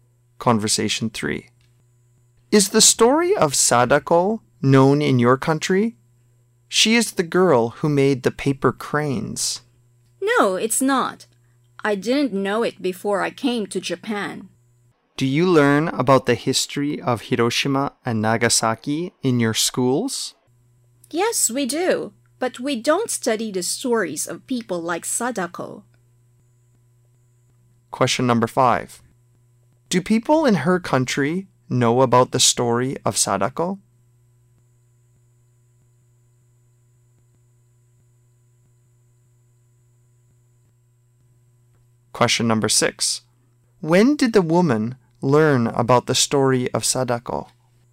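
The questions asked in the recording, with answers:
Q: Do people in her country know about the story of Sadako?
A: No, they don't

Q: When did the woman...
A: After she came to Japan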